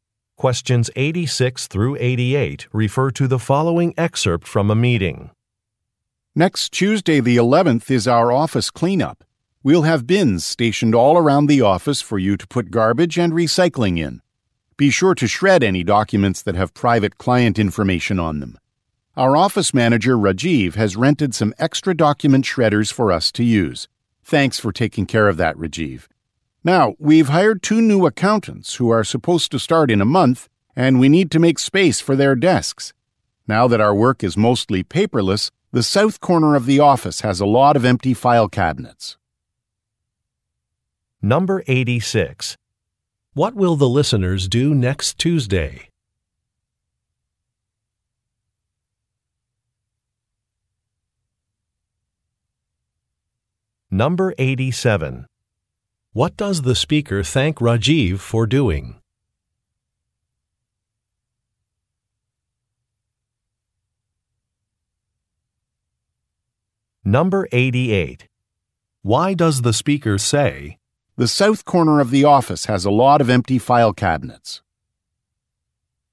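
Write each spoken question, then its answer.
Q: What will the listeners do next Tuesday?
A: Clean up the office

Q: What does the speaker thank Rajiv for doing?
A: Renting extra document shredders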